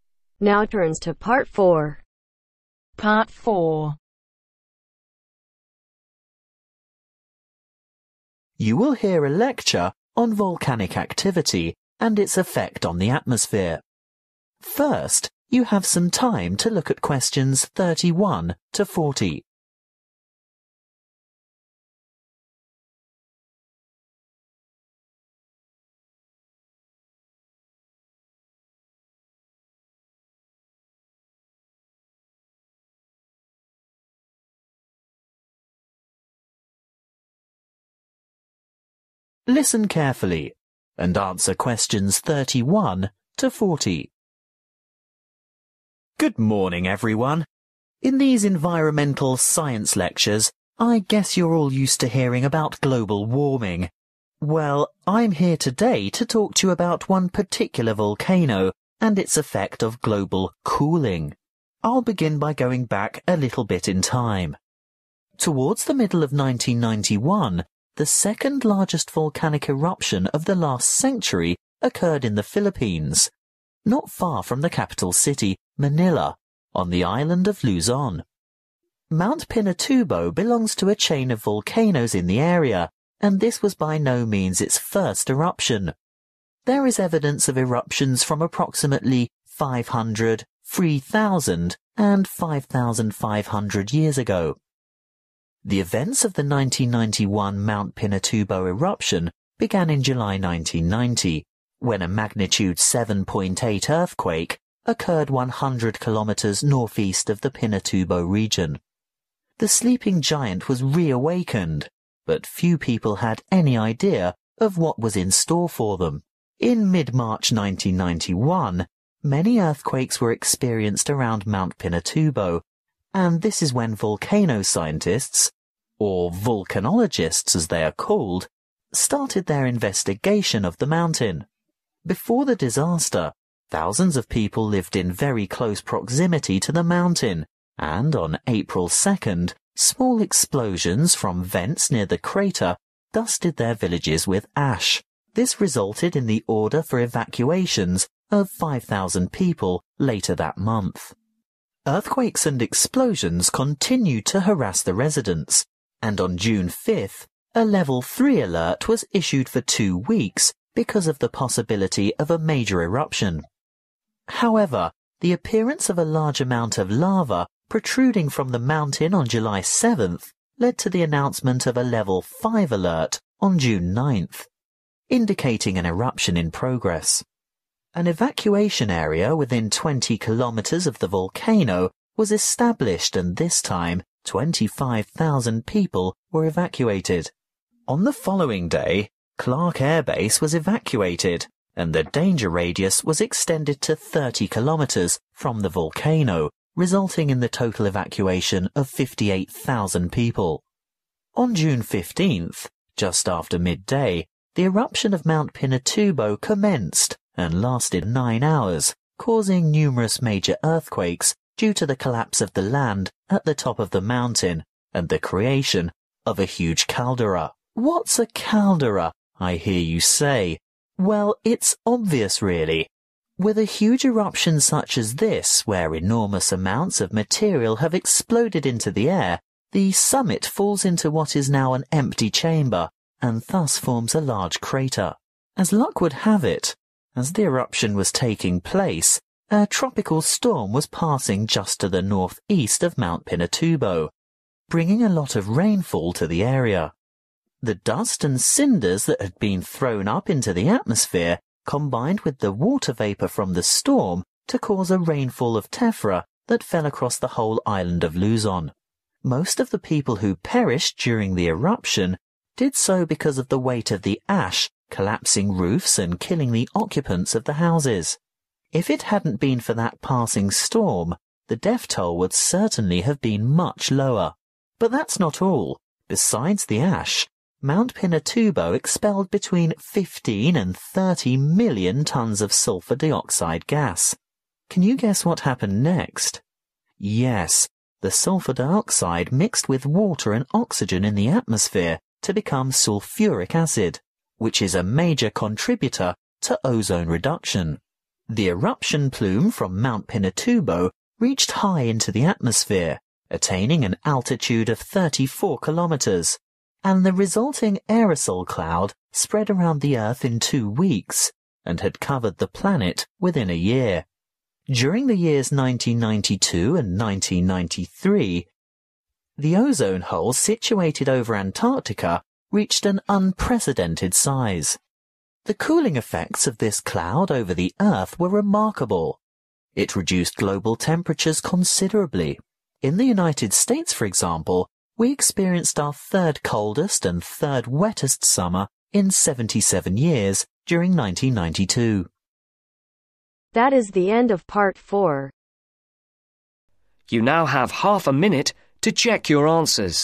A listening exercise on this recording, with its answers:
Answer the questions below. Write NO MORE THAN THREE WORDS AND/OR A NUMBER for each answer.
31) When did Mt. Pinatubo erupt for this first time ? ............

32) When was the earthquake measuring 7.8 recorded ? ............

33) When did the experts begin to study Mt. Pinatubo ? ............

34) What fell on the local villages on 2nd April ? ............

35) What does a 'Level 5' alert mean ? ............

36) Several large earthquakes were triggered by the eruption of Pinatubo on 15th June 1991 because of the (36)............ of the summit.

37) At the same time a (37)............ storm was passing by the rain associated with it mixed with the cinders in the air to form a substance called 'Tephra' which fell on the (38)............ of homes causing them to collapse, crushing hundreds of people.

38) At the same time a (37)............ storm was passing by the rain associated with it mixed with the cinders in the air to form a substance called 'Tephra' which fell on the (38)............ of homes causing them to collapse, crushing hundreds of people.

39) During the eruption, large amounts of sulfur dioxide gas were emitted, which combined with (39)............ and oxygen to make sulfuric acid which was responsible for a great deal of ozone depletion above Antarctica.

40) The overall effect of the cloud from this great eruption was the lowering of global (40)............ .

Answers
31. 5500 Years ago
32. July 1990
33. Mid march 1991
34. Ash
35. Eruption in progress
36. Collapse
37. Tropical
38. Roofs
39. Water
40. Temperatures